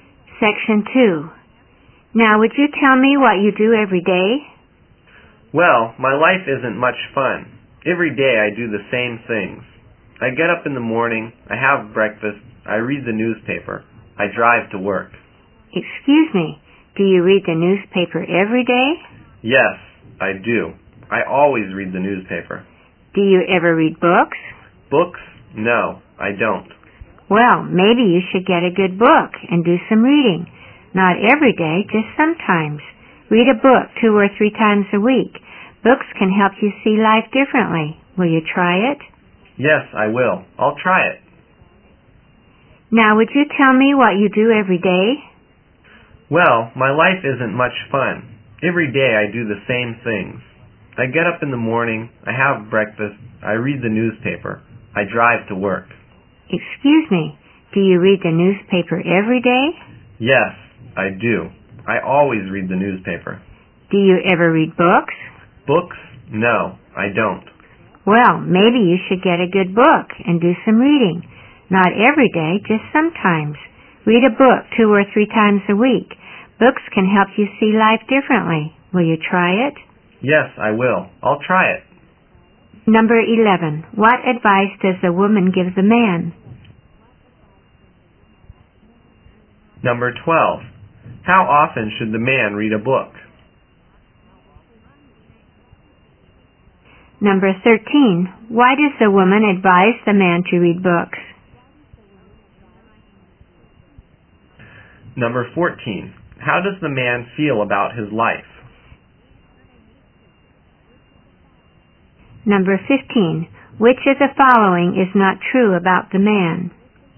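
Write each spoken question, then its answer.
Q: What advice does the woman give the man?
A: To get a good book and do some reading.

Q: How often should the man read a book?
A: 2 or 3 times a week

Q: Why does the woman advise the man to read books?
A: Books can help him see life differently.

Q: How does the man feel about his life?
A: It isn't much fun; he does the same things every day.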